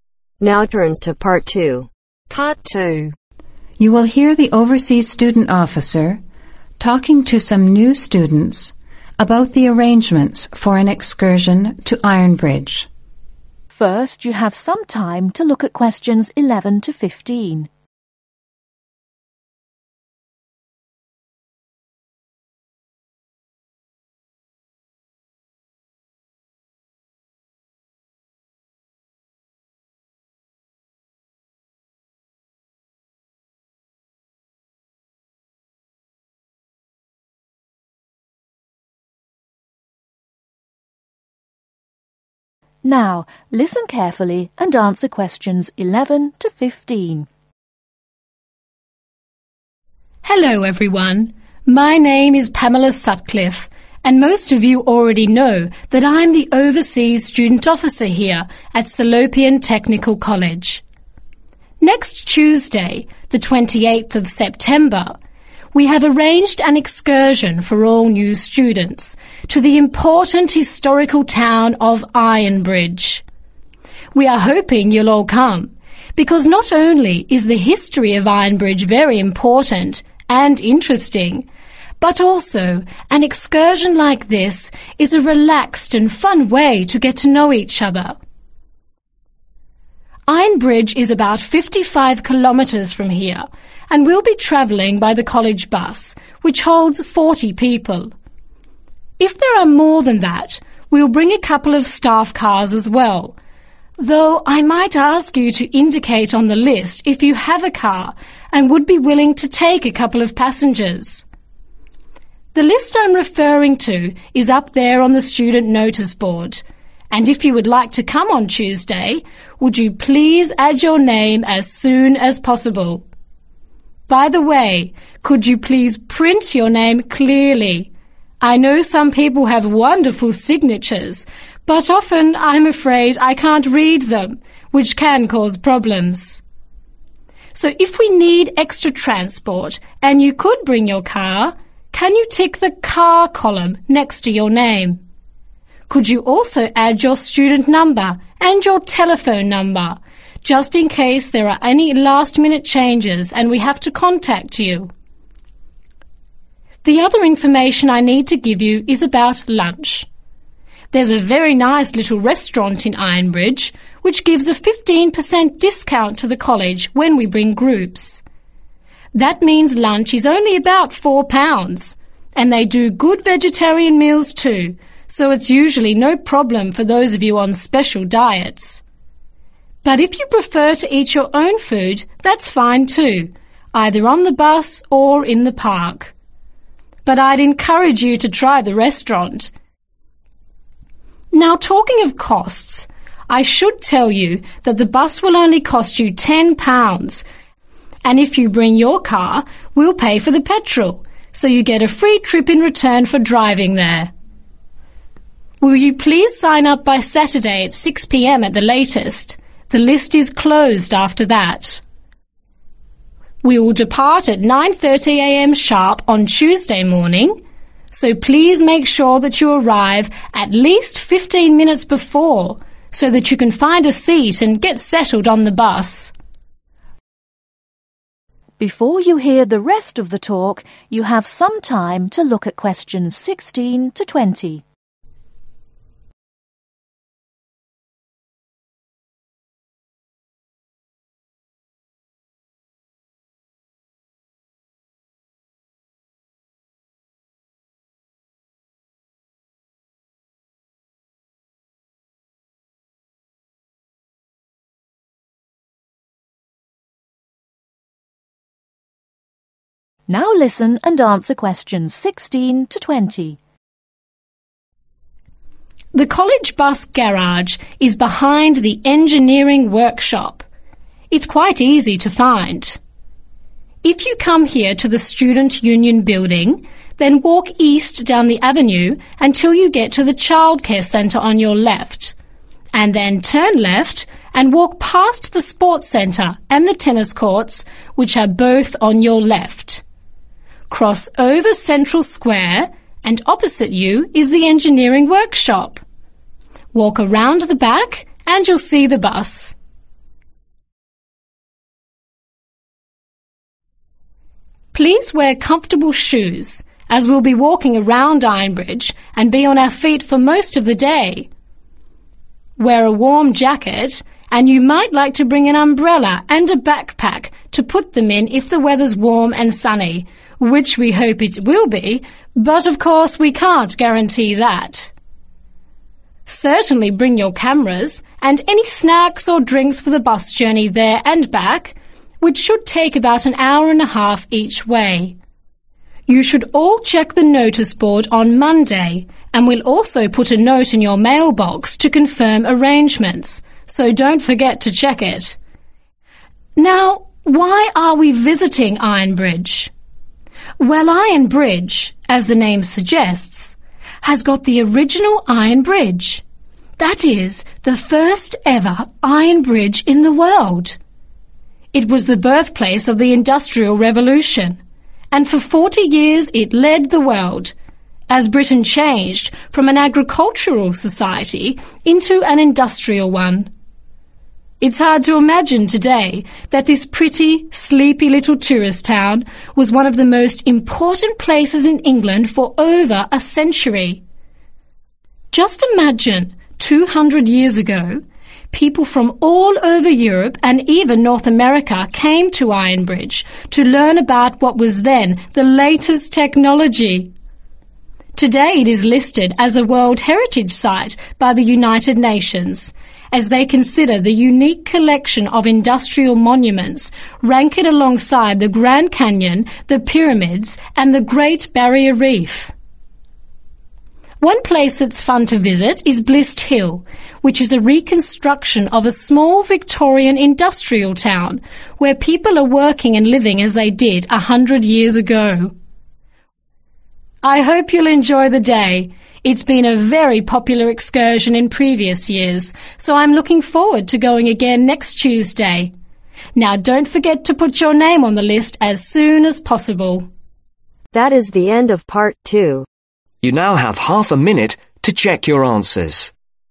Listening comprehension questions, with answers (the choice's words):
Circle the correct letter A-C.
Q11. The excursion is being organized for ............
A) all students.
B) overseas students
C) new students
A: new students

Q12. How far is it from the college to Iron bridge ?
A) 59 kilometers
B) 55 kilometers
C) 50 kilometers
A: 55 kilometers

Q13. Students going on the excursion should look at the list and .....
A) print their name, telephone number, student number and tick if they have a car.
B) print their telephone number and sign their name.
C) print their name and tick if they have a car.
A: print their name, telephone number, student number and tick if they have a car.

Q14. If students do not like eating meat, can they get a cheap meal at the restaurant in Iron bridge ?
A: YES

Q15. What time must the students arrive to catch the bus ?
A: 9.15 am

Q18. Where will students find details in writing on Monday ?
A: Noticeboard/Mail Box